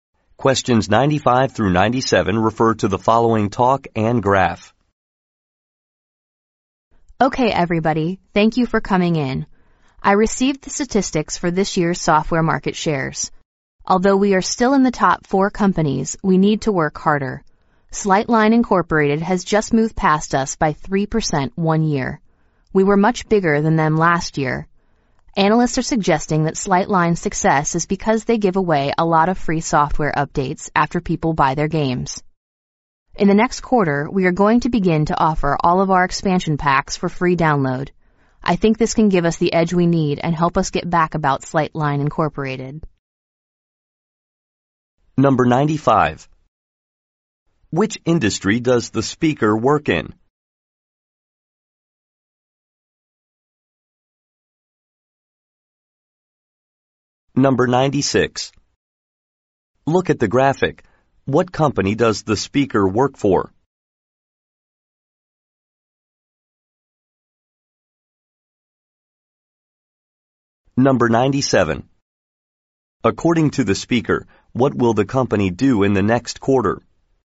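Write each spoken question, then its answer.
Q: Which industry does the speaker work in?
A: Software (games)

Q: According to the speaker, what will the company do in the next quarter?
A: Offer all its expansion packs as free downloads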